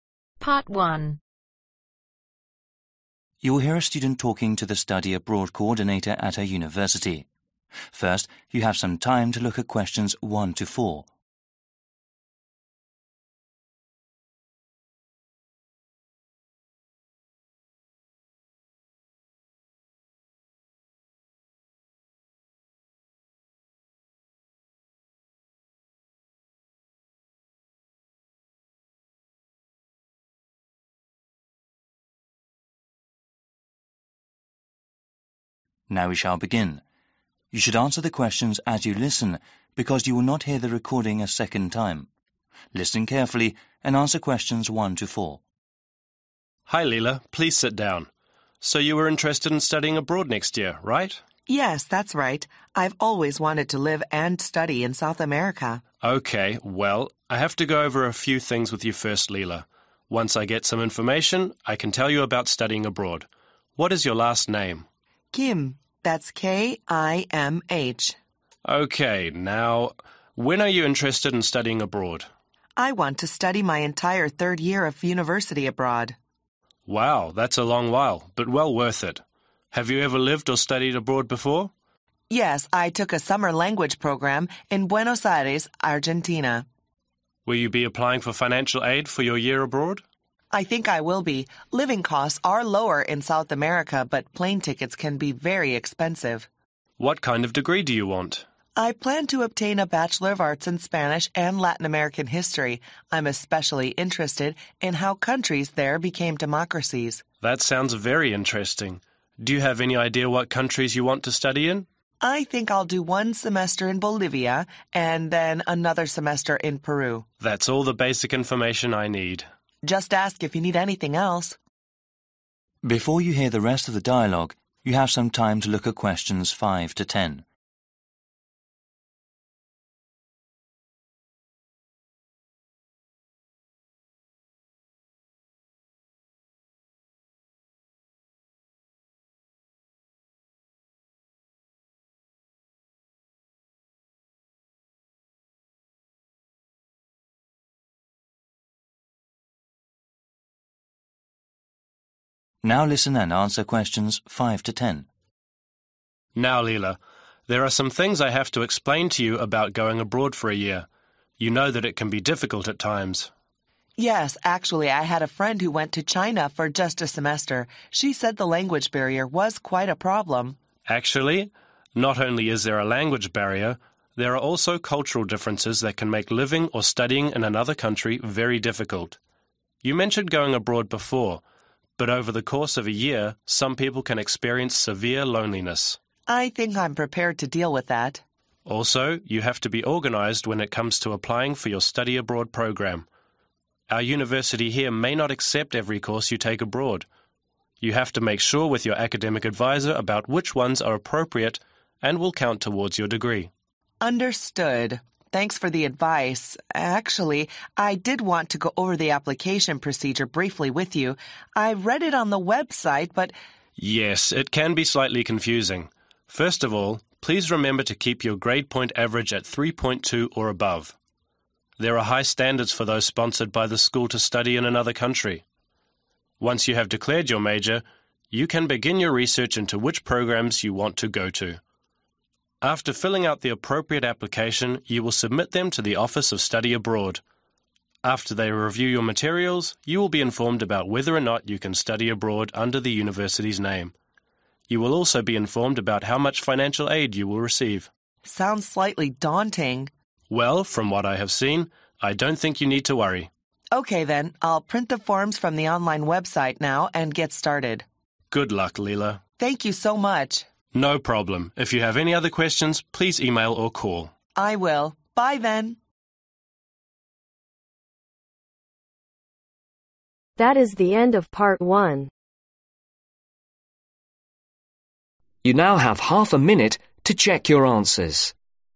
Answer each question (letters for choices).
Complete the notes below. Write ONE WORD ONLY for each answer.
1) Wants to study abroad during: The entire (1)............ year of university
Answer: Third

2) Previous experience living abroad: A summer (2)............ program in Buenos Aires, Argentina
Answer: Language

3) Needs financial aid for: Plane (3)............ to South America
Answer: Tickets

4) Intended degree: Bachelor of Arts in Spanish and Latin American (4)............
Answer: History

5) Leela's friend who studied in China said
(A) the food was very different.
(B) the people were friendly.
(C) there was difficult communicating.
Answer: C

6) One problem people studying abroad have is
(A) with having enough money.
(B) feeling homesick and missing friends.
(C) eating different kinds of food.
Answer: B

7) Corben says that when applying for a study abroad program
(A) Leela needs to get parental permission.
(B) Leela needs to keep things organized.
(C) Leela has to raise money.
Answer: B

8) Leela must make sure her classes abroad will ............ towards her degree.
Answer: Count

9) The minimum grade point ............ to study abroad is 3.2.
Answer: Average

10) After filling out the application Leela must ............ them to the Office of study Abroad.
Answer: Submit